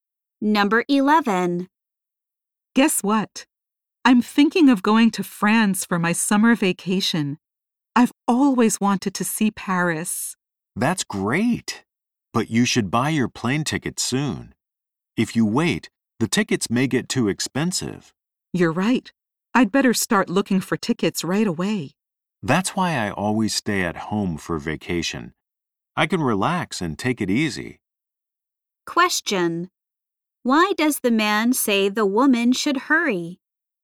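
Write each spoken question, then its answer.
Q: Why does the man say the woman should hurry?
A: Plane tickets may get too expensive if she waits.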